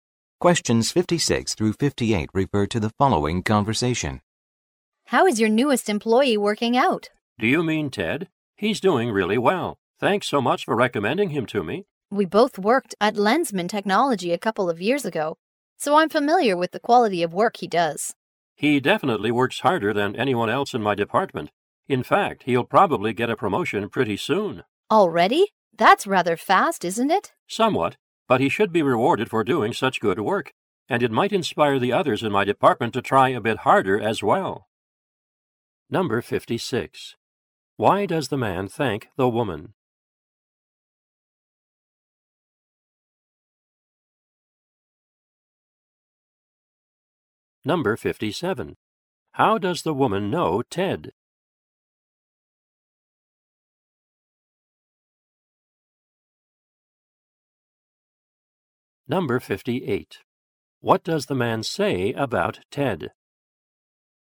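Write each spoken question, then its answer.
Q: Why does the man thank the woman?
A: For recommending Ted

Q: How does the woman know Ted?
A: They worked together at Lensman Technology

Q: What does the man say about Ted?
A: He works hardest and will probably be promoted soon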